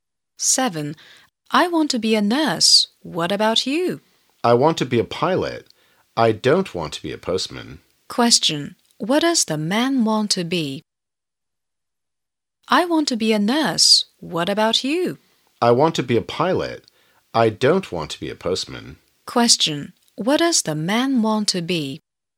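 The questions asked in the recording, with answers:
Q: What does the man want to be?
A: A pilot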